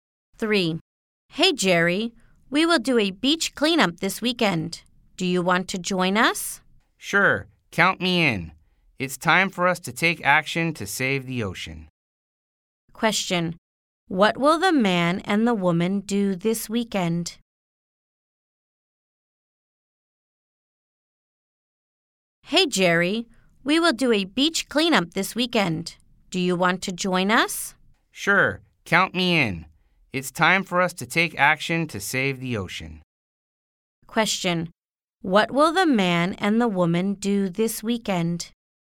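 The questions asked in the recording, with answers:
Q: What will the man and the woman do this weekend?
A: Do a beach cleanup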